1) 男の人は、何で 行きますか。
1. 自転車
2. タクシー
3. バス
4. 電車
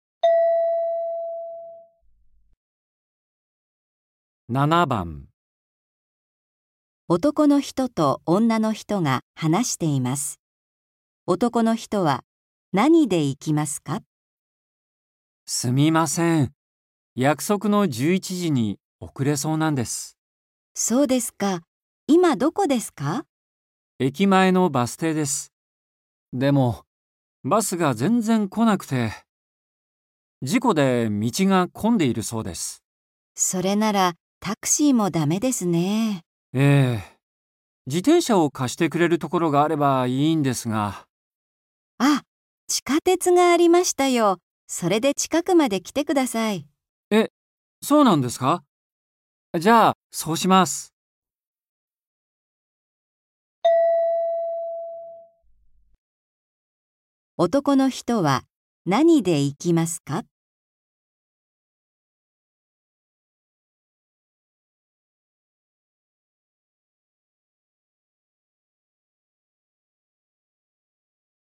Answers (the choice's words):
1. 電車

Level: N4.44